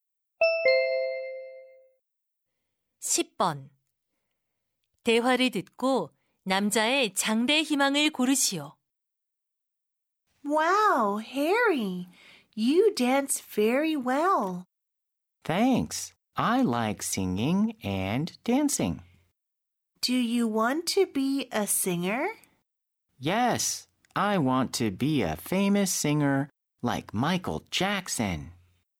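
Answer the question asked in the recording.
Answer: 가수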